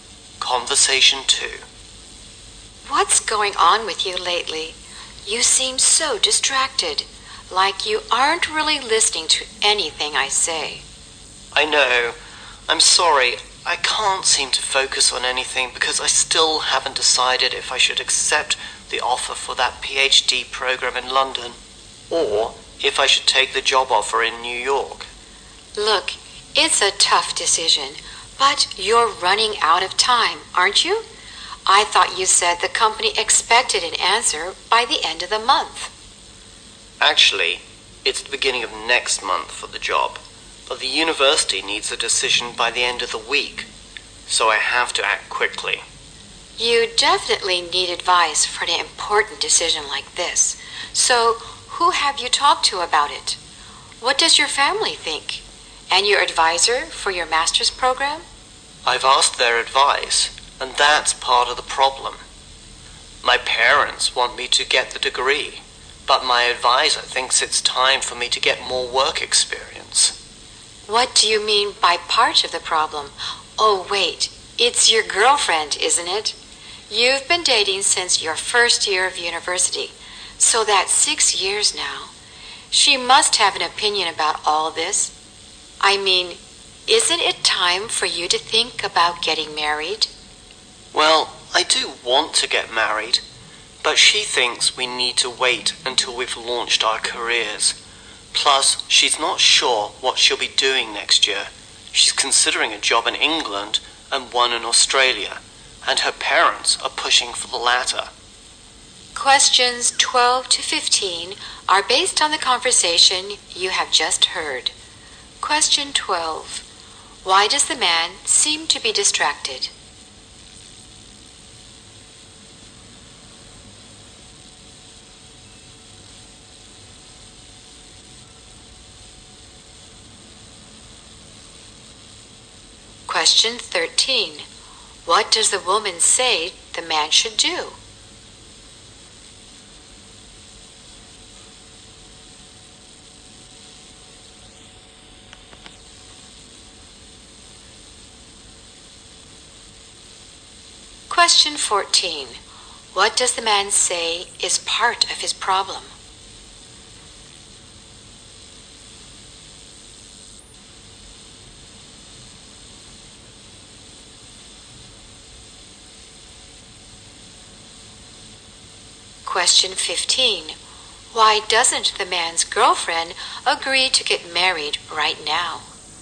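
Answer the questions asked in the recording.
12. He can't decide between a PhD program in London and a job offer in New York.
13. Get advice for the decision.
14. His parents and his advisor give different advice.
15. She thinks they should wait until they have launched their careers.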